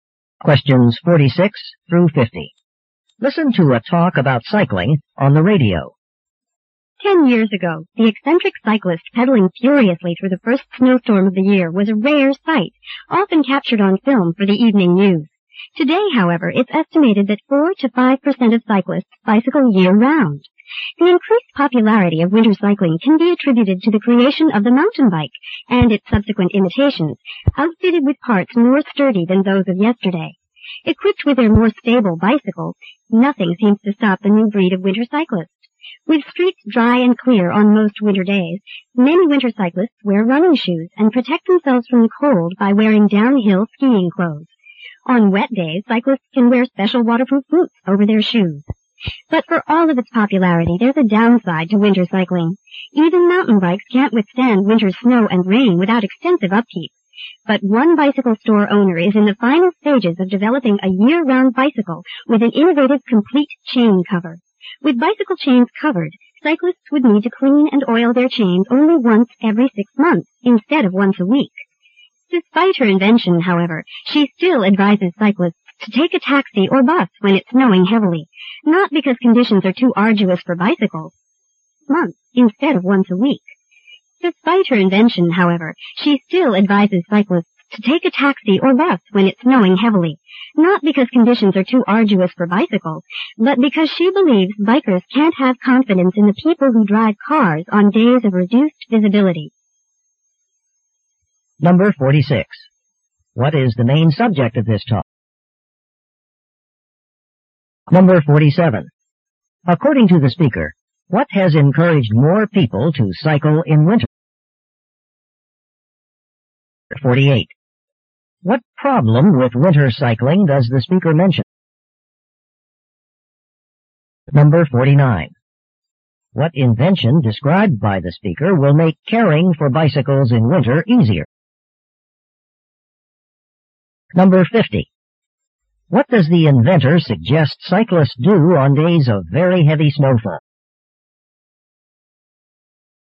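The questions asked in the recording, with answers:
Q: What is the main subject of this talk?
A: Cycling in winter.

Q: According to the speaker, what has encouraged more people to cycle in winter?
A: Sturdier bikes, such as the mountain bike.

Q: What problem with winter cycling does the speaker mention?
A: Bikes need a lot of upkeep in snow and rain.

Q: What invention described by the speaker will make caring for bicycles in winter easier?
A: A complete chain cover.

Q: What does the inventor suggest cyclists do on days of very heavy snowfall?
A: Take a taxi or a bus.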